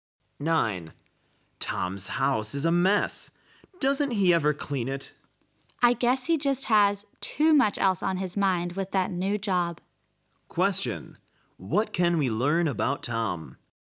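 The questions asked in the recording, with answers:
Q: What can we learn about Tom?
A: He is too busy with his new job to clean his house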